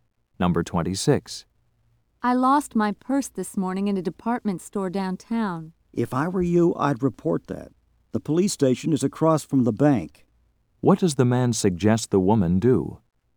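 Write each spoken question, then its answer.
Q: What does the man suggest the woman do?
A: Report the lost purse to the police.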